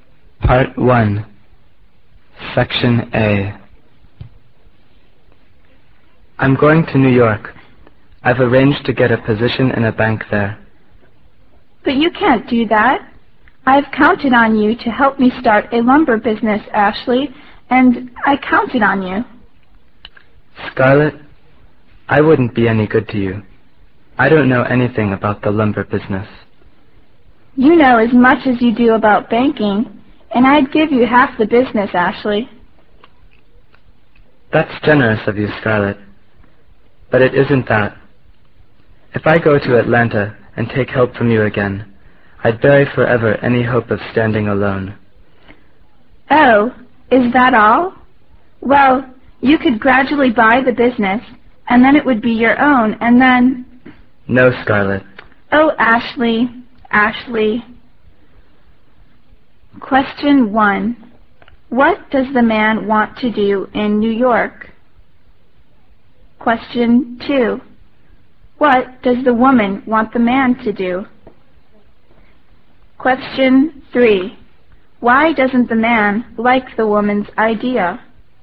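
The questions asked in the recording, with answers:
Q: What does the man want to do in New York?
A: Get a position in a bank

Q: What does the woman want the man to do?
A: Help her start a lumber business

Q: Why doesn't the man like the woman's idea?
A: Taking her help would bury any hope of standing alone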